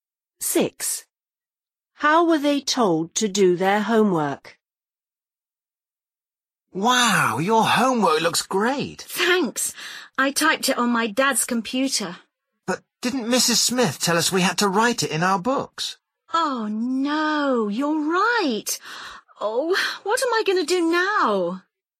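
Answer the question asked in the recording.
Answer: Write it in their books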